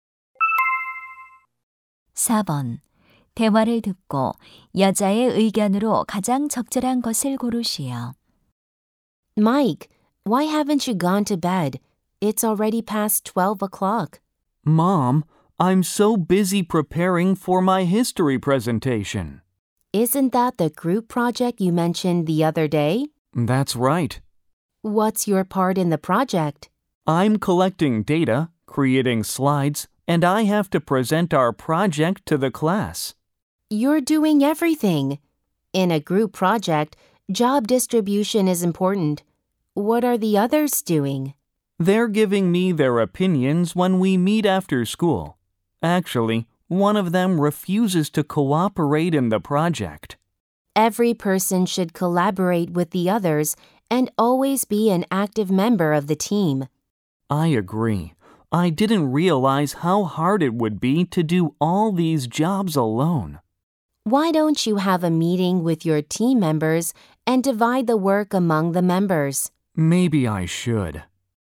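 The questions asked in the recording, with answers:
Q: 대화를 듣고 여자의 의견으로 가장 적절한 것을 고르시오.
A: 조별 과제에서는 모든 구성원이 협력해야 한다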